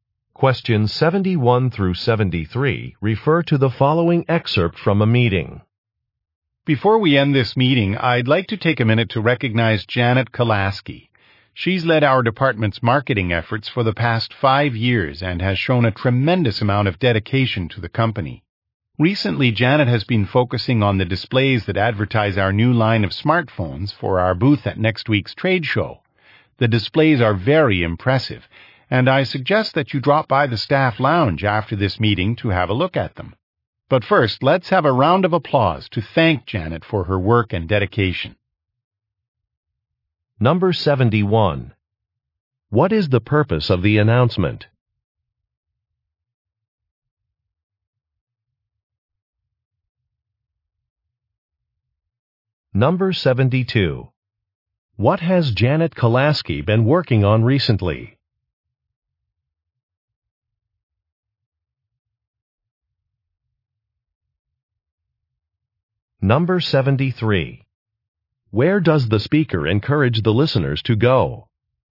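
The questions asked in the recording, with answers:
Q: What is the purpose of the announcement?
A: To recognize Janet Kolaski's work and dedication

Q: What has Janet Kolaski been working on recently?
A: Displays advertising the new smartphones for the trade show booth

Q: Where does the speaker encourage the listeners to go?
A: The staff lounge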